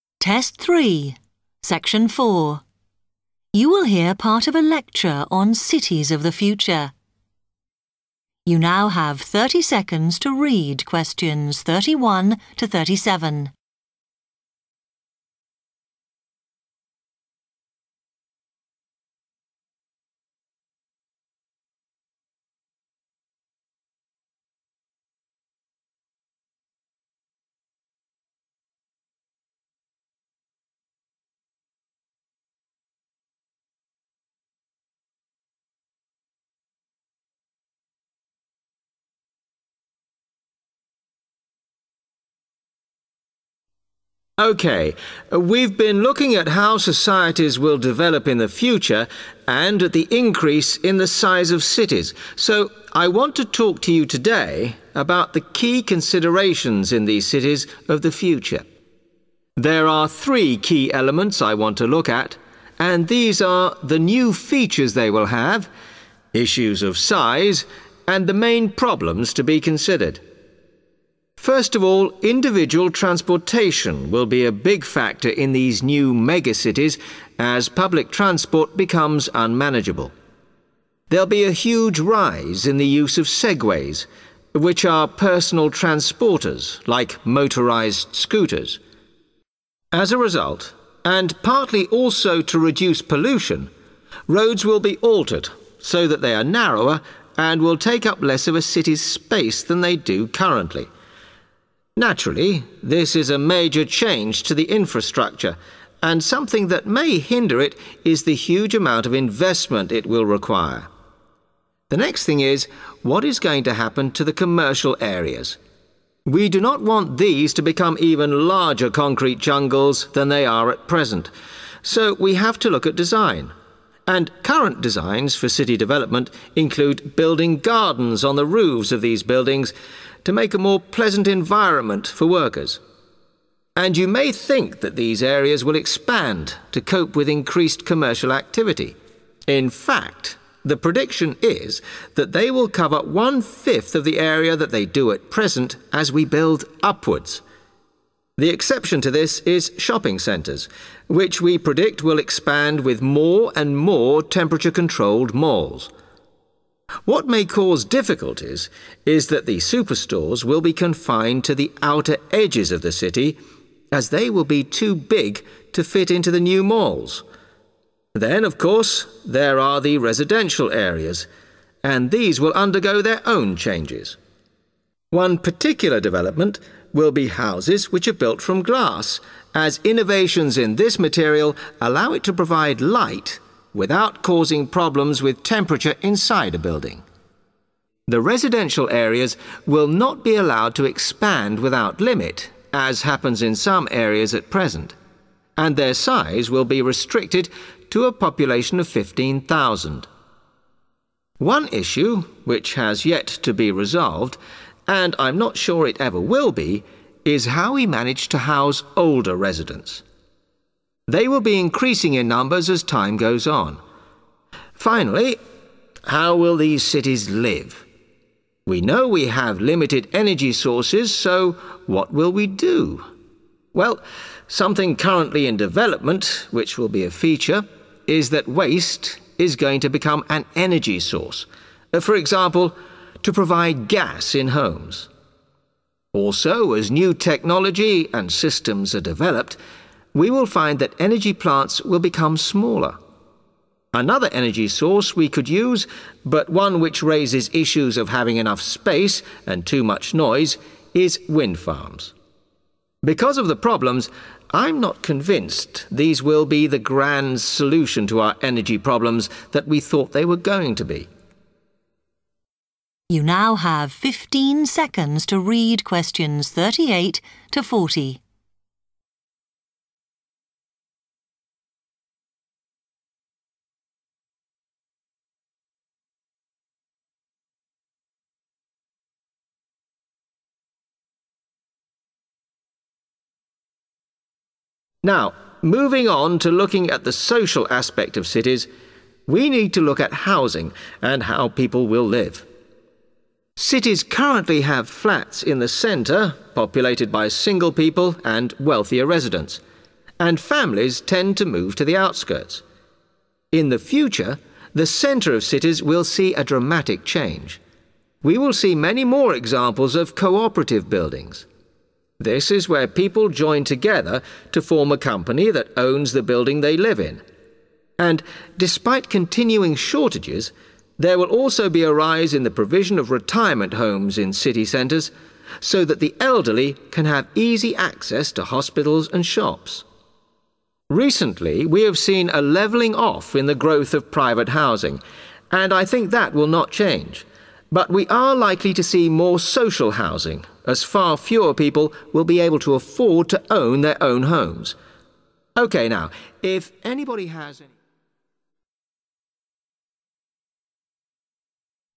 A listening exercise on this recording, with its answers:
Complete the table below. Write NO MORE THAN TWO WORDS for each answer.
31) roofs will have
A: gardens

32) of current area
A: one fifth

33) will be limited to outskirts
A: superstores

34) homes made of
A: glass

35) providing enough housing for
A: older residents

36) will be an energy source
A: waste

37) noise and congestion caused by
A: windfarms / wind farms

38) Which three types of accommodation does the speaker say will increase in city centres? (First type)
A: co-operative buildings / co-operative / cooperative buildings / cooperative

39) Which three types of accommodation does the speaker say will increase in city centres? (Second type)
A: retirement homes / retirement

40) Which three types of accommodation does the speaker say will increase in city centres? (Third type)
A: social housing / social

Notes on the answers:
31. The transcript explains that new designs for commercial buildings will have gardens on their roofs to make working there more pleasant. Answer Explanation: The answer "gardens" means outdoor areas with plants, flowers, or trees built on top of buildings. Reason For Correctness: The correct answer is "gardens" because when the speaker discusses the future of commercial areas, he explains that new building designs include putting gardens on the roofs to create a better environment for workers.
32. The transcript explains that commercial zones will only take up one fifth of their current ground space in the future because buildings will be constructed taller. Answer Explanation: The answer "one fifth" means a fraction equal to 1 out of 5 parts (or 20 percent) of the current size. Reason For Correctness: The correct answer is "one fifth" because the speaker discusses the future size of commercial areas and states that they are predicted to take up only "one fifth of the area that they do at present" since cities will build upwards. In the table, " of current area" directly matches "one fifth of the area that they do at present".
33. The transcript explains that very large retail shops (superstores) will only be allowed on the far edges or outskirts of the city because of their huge size. Answer Explanation: The answer refers to very large shops or retail stores. Reason For Correctness: The correct answer is supported by the speaker's discussion of problems in commercial areas. The speaker explains that "superstores" will be restricted or confined to the city's outer edges because they are too large to fit inside the new shopping malls. In the notes, "limited to outskirts" matches the phrase "confined to the outer edges of the city".
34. The transcript states that a new change in living areas will be houses made out of glass because new improvements allow light in without causing heat problems. Answer Explanation: The answer "glass" refers to a hard, clear, see-through material that is normally used to make windows and bottles. Reason For Correctness: The correct answer is "glass" because the speaker discusses residential areas in future cities and specifically mentions that houses will be built using this material. In this context, "houses which are built from" matches the table's phrase "homes made of".
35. The transcript states that a big problem still not solved is how to provide housing for the elderly citizens. Answer Explanation: The answer means elderly people who live in the city. Reason For Correctness: The correct answer is "older residents" because when discussing the problems in residential areas, the speaker identifies an unresolved issue: finding a way to provide homes for senior citizens. In the transcript, the phrase "how we manage to house" directly corresponds to "providing enough housing for", and "issue which has yet to be resolved" matches the "Problems" column.
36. The transcript explains that a future feature of cities will be using trash (waste) as a source of energy, such as for household gas. Answer Explanation: The answer "waste" means rubbish, garbage, or unwanted materials that people throw away. Reason For Correctness: The correct answer is "waste" because the speaker discusses energy in future cities and mentions a new feature being developed. The speaker specifically states that "waste is going to become an energy source" to help provide power like gas for homes. Therefore, "waste" correctly fills the blank.
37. The transcript states that windfarms are an energy option that causes concerns because they require a lot of space and make a lot of noise. Answer Explanation: The answer refers to areas with groups of wind turbines that produce electricity from the wind. Reason For Correctness: The correct answer is "windfarms" (or "wind farms") because the speaker discusses future energy sources and explains that windfarms create problems related to space and too much noise.
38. The transcript states that city centres will experience big changes in the future, including an increase in co-operative buildings. Answer Explanation: The answer refers to buildings that are owned together by the group of residents who live in them. Reason For Correctness: The correct answer is confirmed when the speaker discusses how housing in city centres will change in the future. The speaker states, "We will see many more examples of co-operative buildings," indicating that this is the first kind of accommodation that will grow in number.
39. The transcript explains that more retirement homes will be built and provided in city centres to help elderly residents live near essential places like shops and hospitals. Answer Explanation: The answer means housing or living facilities built specially for older people who have stopped working. Reason For Correctness: The correct answer is supported by the speaker's discussion about future housing in city centres. The speaker states that there will be a "rise in the provision" (meaning an increase) of "retirement homes" located right in the middle of cities so elderly people can easily reach hospitals and shops.
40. The transcript states that private home construction is not increasing, but the amount of social housing will grow because fewer people can afford to own their own houses. Answer Explanation: The answer refers to government-assisted or affordable homes built for people who cannot afford to buy regular private houses. Reason For Correctness: The correct answer is "social (housing)" because the speaker discusses three types of accommodation that will increase in city centres in the future. After describing co-operative buildings and retirement homes, the speaker notes that "we are likely to see more social housing" because fewer people will be able to afford their own homes. The phrase "see more" directly indicates an increase.

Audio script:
M: OK, we've been looking at how societies will develop in the future and at the increase in the size of cities, so I want to talk to you today about the key considerations in these cities of the future. There are three key elements I want to look at and these are the new features they will have, issues of size and the main problems to be considered. First of all, individual transportation will be a big factor in these new mega cities as public transport becomes unmanageable. There'll be a huge rise in the use of Segways, which are personal transporters like motorised scooters. As a result, and partly also to reduce pollution, roads will be altered so that they are narrower and will take up less of a city's space than they do currently. Naturally, this is a major change to the infrastructure and something that may hinder it is the huge amount of investment it will require. The next thing is, what is going to happen to the commercial areas? We do not want these to become even larger concrete jungles than they are at present so we have to look at design, and current designs for city development include building gardens on the roofs of these buildings to make a more pleasant environment for workers. And you may think that these areas will expand to cope with increased commercial activity. In fact, the prediction is that they will cover one fifth of the area that they do at present as we build upwards. The exception to this is shopping centres, which we predict will expand with more and more temperature controlled malls. What may cause difficulties is that the superstores will be confined to the outer edges of the city as they will be too big to fit into the new malls. Then, of course, there are the residential areas and these will undergo their own changes. One particular development will be houses which are built from glass, as innovations in this material allow it to provide light without causing problems with temperature inside a building. The residential areas will not be allowed to expand without limit, as happens in some areas at present, and their size will be restricted to a population of 15,000. One issue which has yet to be resolved, and I'm not sure it ever will be, is how we manage to house older residents. They will be increasing in numbers as time goes on. Finally, how will these cities live? We know we have limited energy sources so what will we do? Well, something currently in development which will be a feature, is that waste is going to become an energy source, for example, to provide gas in homes. Also as new technology and systems are developed we will find that energy plants will become smaller. Another energy source we could use, but one which raises issues of having enough space and too much noise is windfarms. Because of the problems, I'm not convinced these will be the grand solution to our energy problems that we thought they were going to be.
Now, moving on to looking at the social aspect of cities, we need to look at housing and how people will live. Cities currently have flats in the centre populated by single people and wealthier residents, and families tend to move to the outskirts. In the future, the centre of cities will see a dramatic change. We will see many more examples of co-operative buildings. This is where people join together to form a company that owns the building they live in. And, despite continuing shortages, there will also be a rise in the provision of retirement homes in city centres so that the elderly can have easy access to hospitals and shops. Recently, we have seen a levelling off in the growth of private housing and I think that will not change, but we are likely to see more social housing as far fewer people will be able to afford to own their own homes.
OK, now, if anybody ... (fade) ...